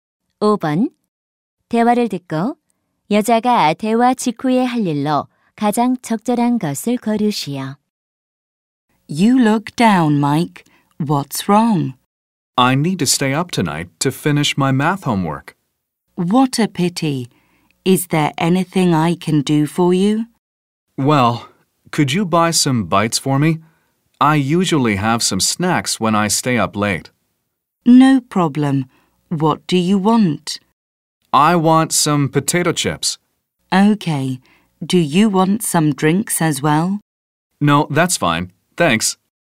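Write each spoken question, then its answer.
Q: 대화를 듣고 여자가 대화 직후에 할 일로 가장 적절한 것을 고르시오.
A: 감자칩 사러 가기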